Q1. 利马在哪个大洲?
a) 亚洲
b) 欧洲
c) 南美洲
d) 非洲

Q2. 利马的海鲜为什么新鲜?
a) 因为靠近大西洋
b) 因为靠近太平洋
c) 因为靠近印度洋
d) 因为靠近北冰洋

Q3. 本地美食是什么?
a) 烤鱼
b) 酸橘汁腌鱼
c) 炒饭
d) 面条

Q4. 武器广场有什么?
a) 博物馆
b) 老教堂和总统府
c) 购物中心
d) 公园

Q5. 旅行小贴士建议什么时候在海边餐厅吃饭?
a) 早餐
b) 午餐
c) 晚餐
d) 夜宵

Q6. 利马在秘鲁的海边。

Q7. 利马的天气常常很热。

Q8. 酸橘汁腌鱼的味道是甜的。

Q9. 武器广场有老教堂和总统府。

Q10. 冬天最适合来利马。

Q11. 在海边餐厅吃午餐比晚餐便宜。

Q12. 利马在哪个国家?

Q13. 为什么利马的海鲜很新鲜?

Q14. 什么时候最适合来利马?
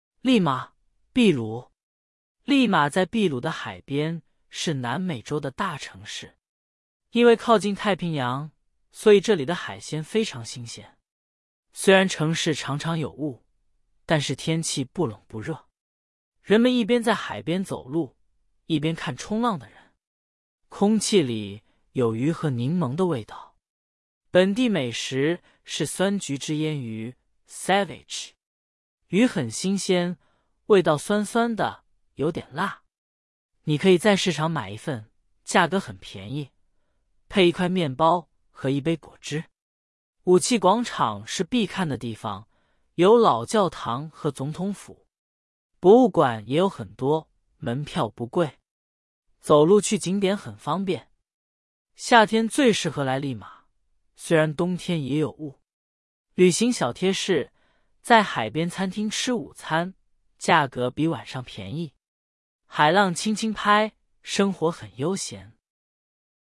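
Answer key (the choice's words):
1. 南美洲
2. 因为靠近太平洋
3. 酸橘汁腌鱼
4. 老教堂和总统府
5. 午餐
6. 对
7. 错
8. 错
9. 对
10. 错
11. 对
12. 秘鲁
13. 因为靠近太平洋
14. 夏天

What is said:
利马,秘鲁
利马在秘鲁的海边,是南美洲的大城市。因为靠近太平洋,所以这里的海鲜非常新鲜。
虽然城市常常有雾,但是天气不冷不热。人们一边在海边走路,一边看冲浪的人。空气里有鱼和柠檬的味道。
本地美食是酸橘汁腌鱼(ceviche)。鱼很新鲜,味道酸酸的,有点辣。你可以在市场买一份,价格很便宜,配一块面包和一杯果汁。
武器广场是必看的地方,有老教堂和总统府。博物馆也有很多,门票不贵。走路去景点很方便。
夏天最适合来利马,虽然冬天也有雾。旅行小贴士:在海边餐厅吃午餐,价格比晚上便宜。
海浪轻轻拍,生活很悠闲。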